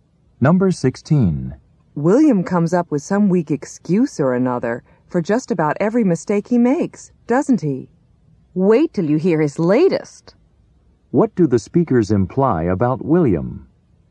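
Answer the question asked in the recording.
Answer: He always makes excuses for his mistakes, and has a new one.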